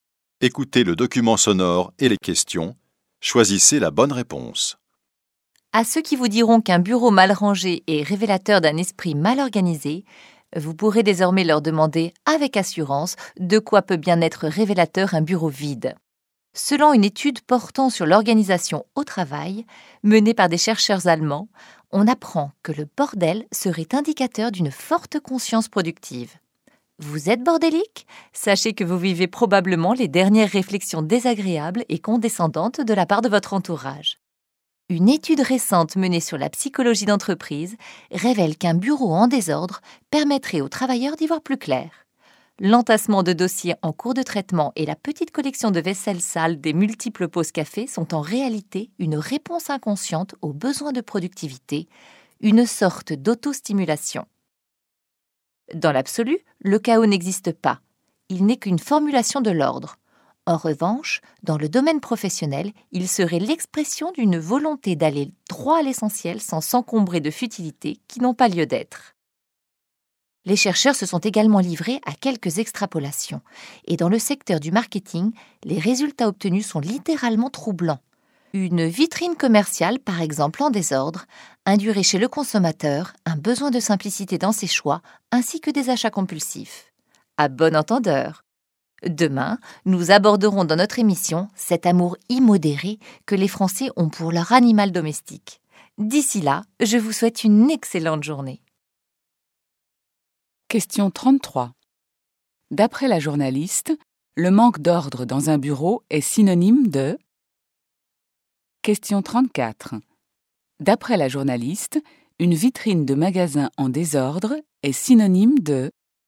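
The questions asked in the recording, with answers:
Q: D'après la journaliste, le manque d'ordre dans un bureau est synonyme de...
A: une forte conscience productive (productivité)

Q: D'après la journaliste, une vitrine de magasin en désordre est synonyme de...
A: besoin de simplicité dans les choix et achats compulsifs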